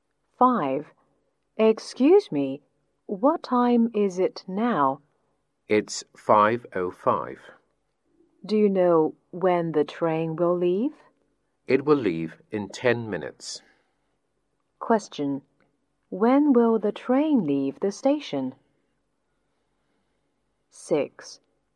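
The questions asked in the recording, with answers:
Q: When will the train leave the station?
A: At 5:15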